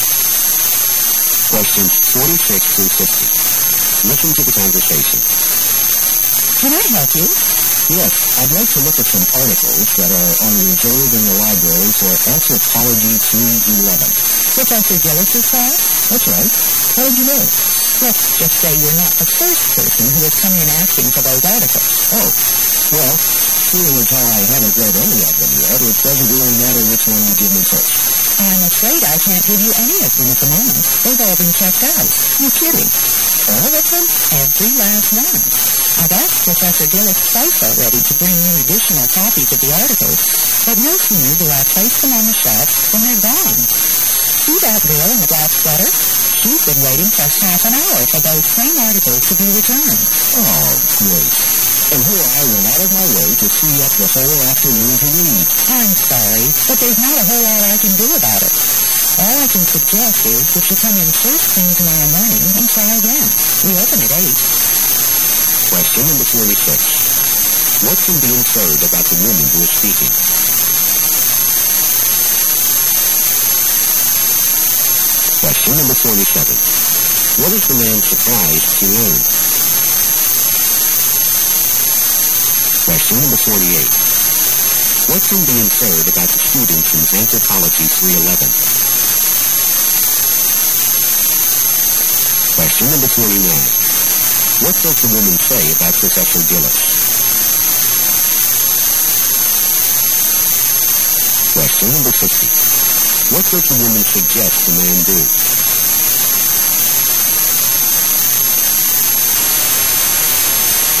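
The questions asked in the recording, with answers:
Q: What can be inferred about the woman who is speaking?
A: She is a librarian

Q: What is the man surprised to learn?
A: That all the articles are checked out

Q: What can be inferred about the student from Anthropology 311?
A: Many of them want to read the same articles

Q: What does the woman say about Professor Gillis?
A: She has asked him twice to bring in more copies

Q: What does the woman suggest the man do?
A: Come back first thing tomorrow morning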